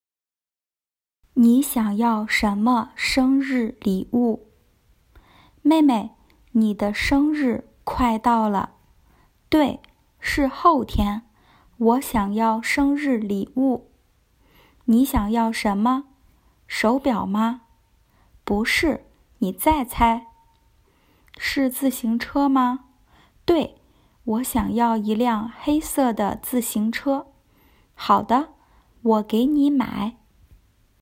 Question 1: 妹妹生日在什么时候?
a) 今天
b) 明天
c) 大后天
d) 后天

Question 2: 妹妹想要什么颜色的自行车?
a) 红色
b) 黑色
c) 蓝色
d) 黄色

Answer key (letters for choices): 1d, 2b

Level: beginners